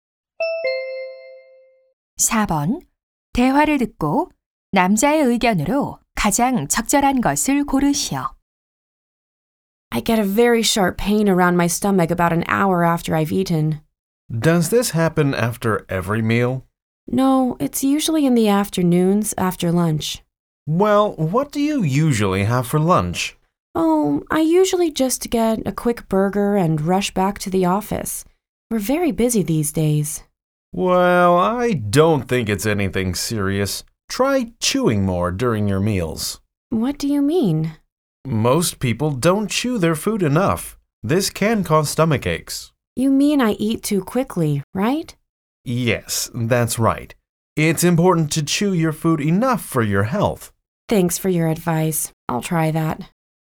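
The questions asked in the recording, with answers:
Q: 대화를 듣고 남자의 의견으로 가장 적절한 것을 고르시오.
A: 건강을 위해 음식을 충분히 씹어 먹어야 한다.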